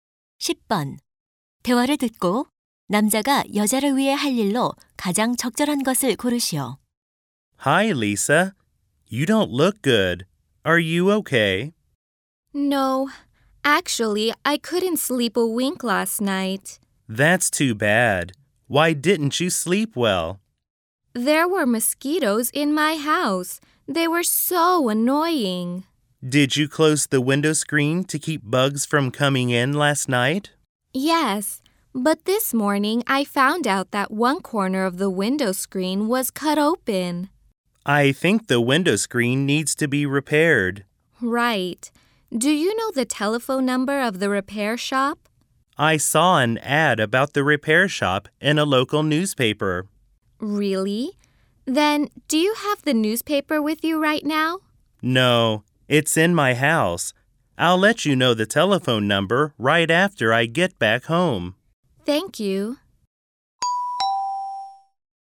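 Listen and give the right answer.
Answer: 수리점 전화번호 알려주기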